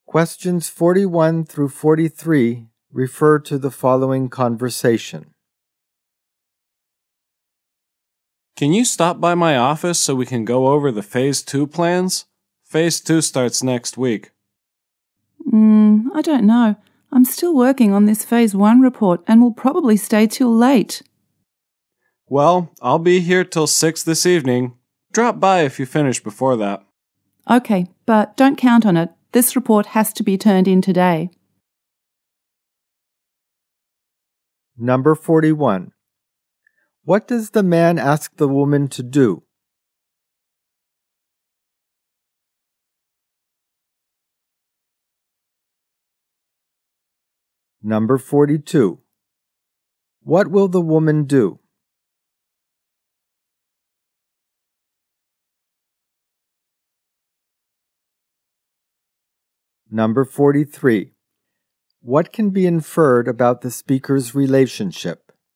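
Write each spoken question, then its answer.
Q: What does the man ask the woman to do?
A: Stop by his office to go over the Phase 2 plans

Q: What will the woman do?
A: Stay late to finish the Phase 1 report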